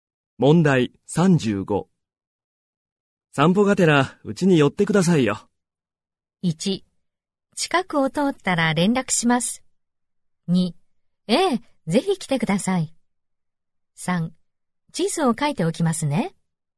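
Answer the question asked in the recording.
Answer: 1: 近くを通ったら連絡します。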